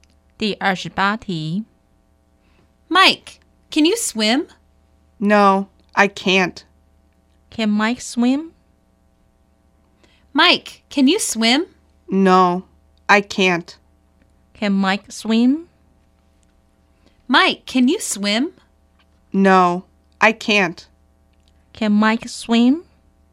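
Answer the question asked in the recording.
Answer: No, he can't.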